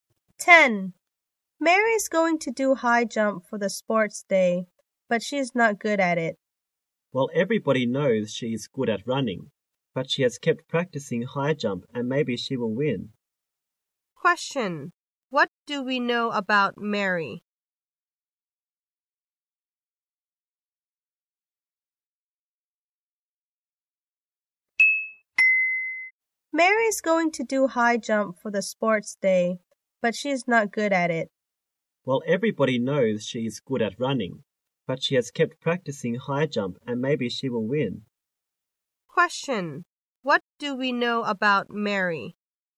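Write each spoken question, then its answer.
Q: Question, what do we know about Mary?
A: She is good at running but not at high jump, and she has kept practicing high jump.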